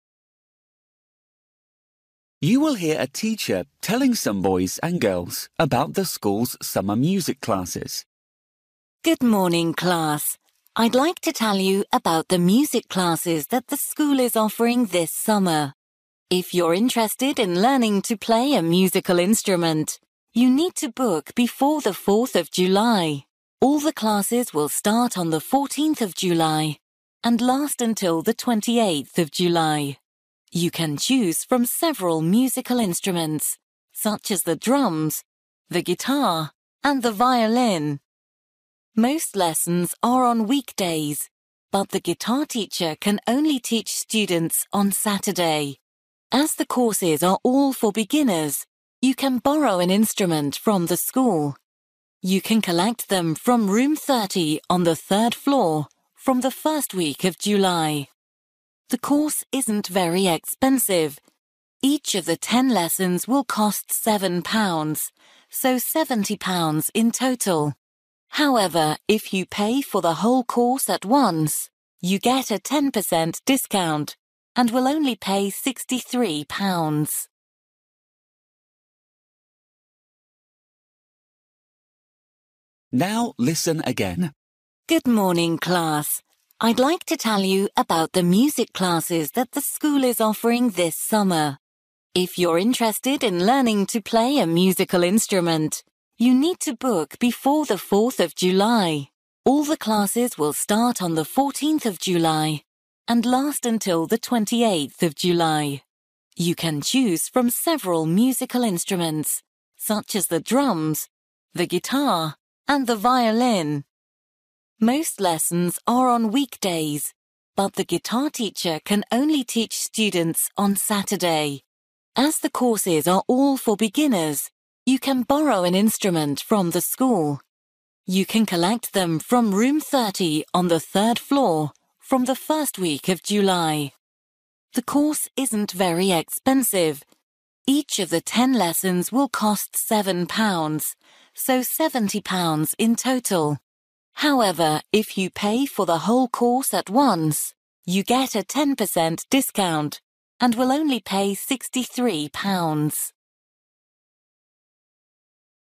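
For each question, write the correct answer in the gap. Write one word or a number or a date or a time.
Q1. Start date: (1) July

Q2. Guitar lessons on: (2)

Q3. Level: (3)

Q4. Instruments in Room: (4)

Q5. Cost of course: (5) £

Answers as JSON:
{"1": "14th", "2": "Saturday", "3": "beginners", "4": "30", "5": "63"}

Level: Luyện nghe trình độ A2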